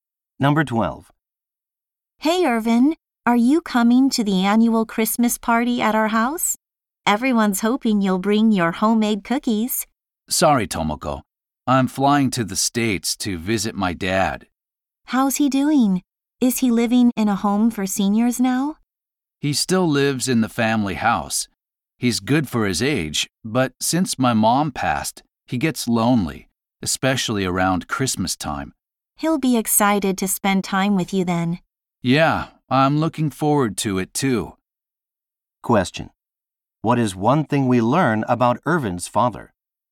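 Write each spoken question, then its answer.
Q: What is one thing we learn about Irvin's father?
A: He still lives in the family house and gets lonely since his wife died.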